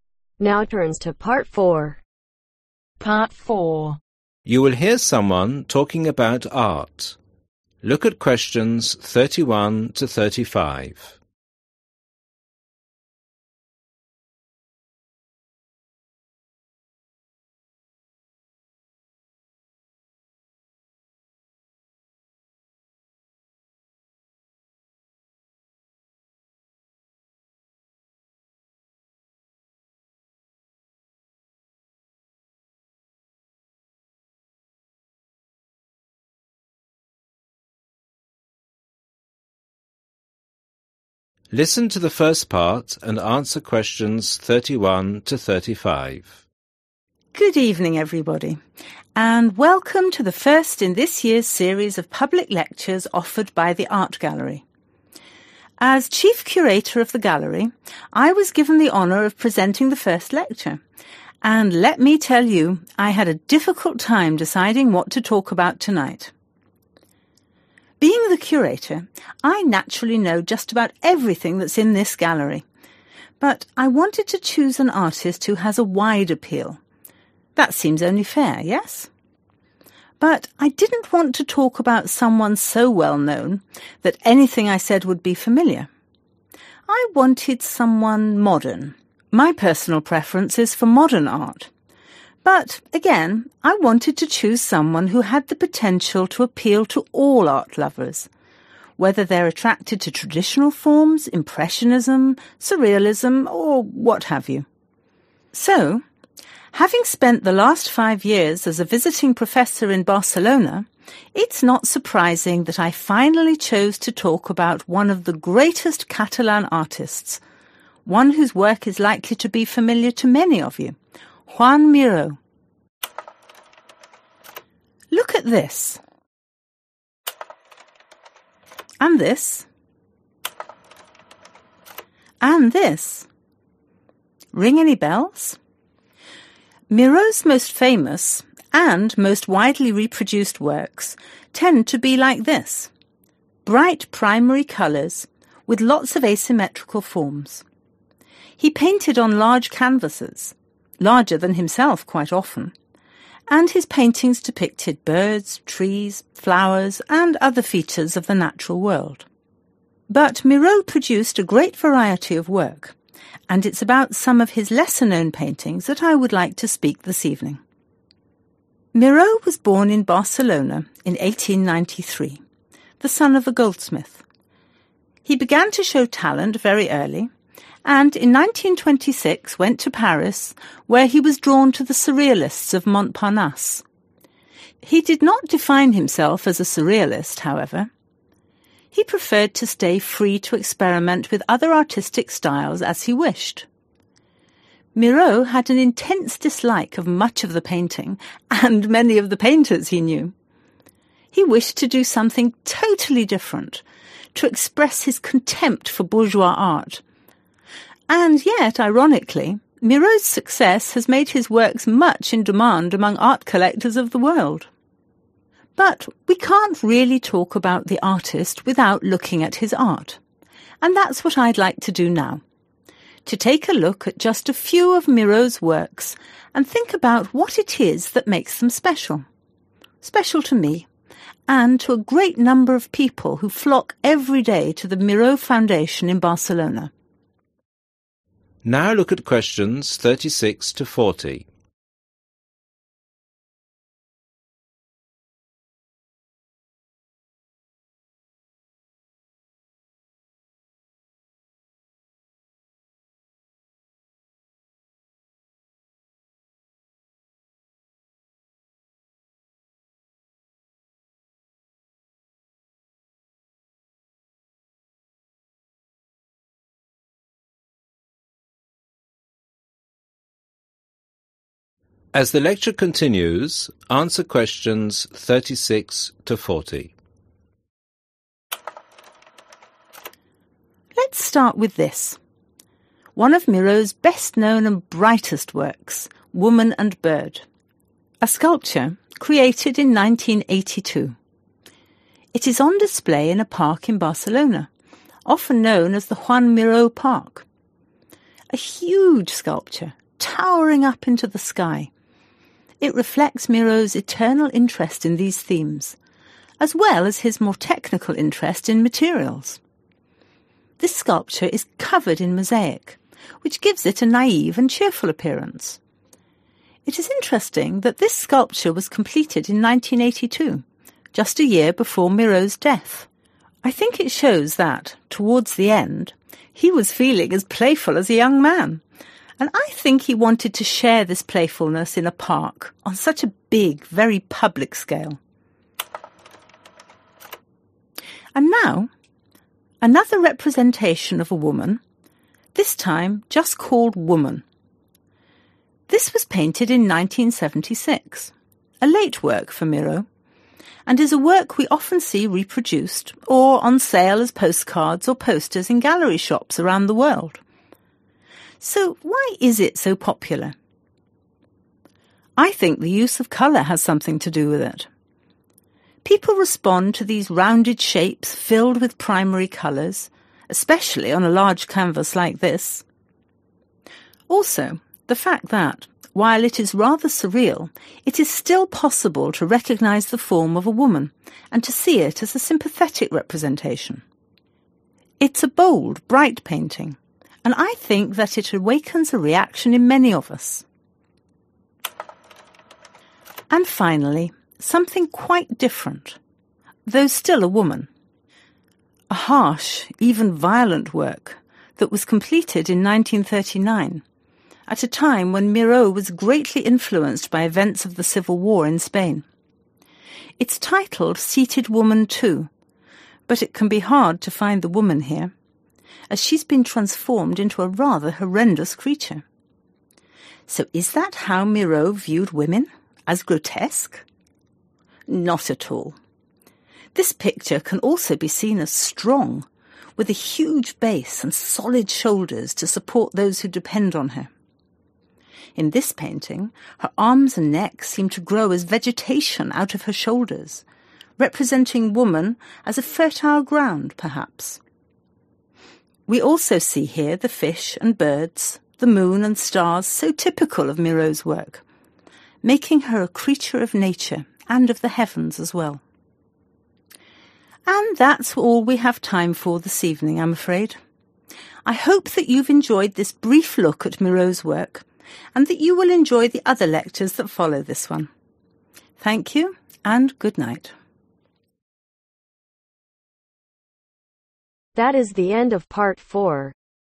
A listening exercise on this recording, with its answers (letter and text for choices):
Choose the correct letter A , B or C.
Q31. Who is giving this talk ?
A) An artist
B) An art critic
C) An curator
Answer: C) An curator

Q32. Why did the speaker choose to speak about Joan Miro ?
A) Because a new work by Miro was recently added to the gallery.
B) Because he thought Miro would appeal to people with different tastes.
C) Because he felt everyone would be familiar with Joan Miro's art.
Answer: B) Because he thought Miro would appeal to people with different tastes.

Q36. "Women and (36)............ "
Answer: Bird

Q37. A (37)............ in Barcelona.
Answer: Park

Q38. Tall sculpture, covered in (38)...........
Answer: Mosaic

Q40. Painted when Miro was influenced by the (40)............ in Spain.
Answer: Civil War